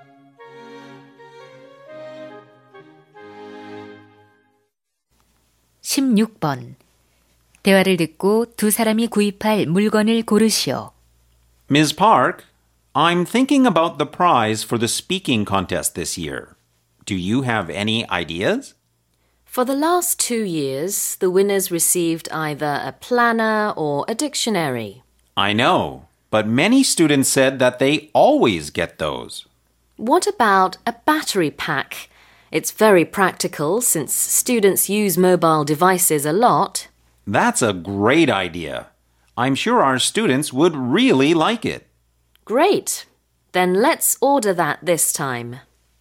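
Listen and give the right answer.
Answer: 보조 배터리(배터리 팩)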